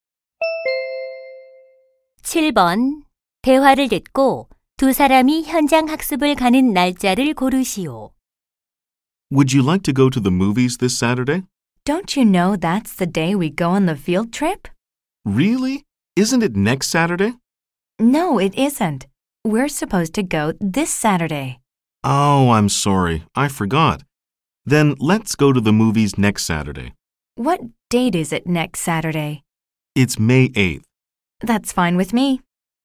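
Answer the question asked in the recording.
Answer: 5월 1일 (이번 토요일)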